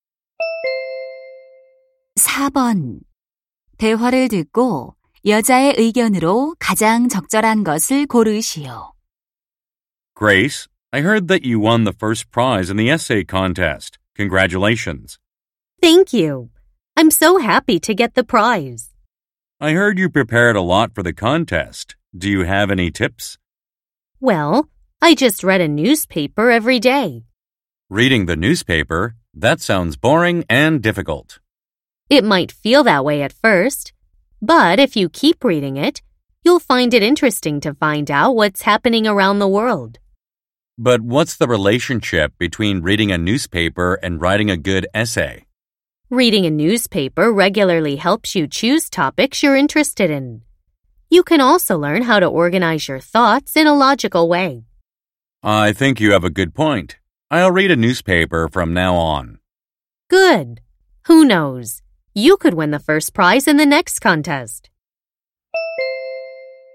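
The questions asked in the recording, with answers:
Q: 대화를 듣고 여자의 의견으로 가장 적절한 것을 고르시오.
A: 신문을 꾸준히 읽으면 글쓰기에 도움이 된다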